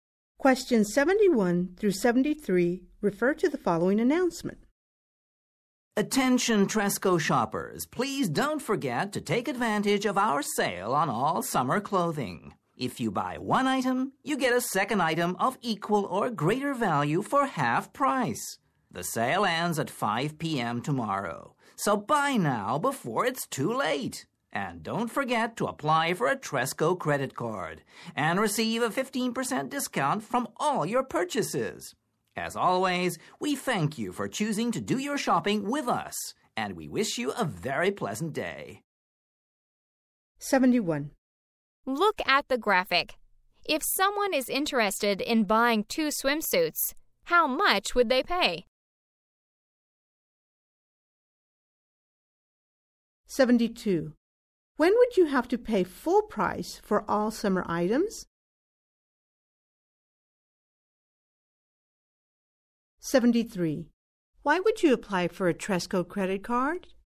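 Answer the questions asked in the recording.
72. After 5 p.m. tomorrow, when the sale ends
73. To get a 15% discount on all purchases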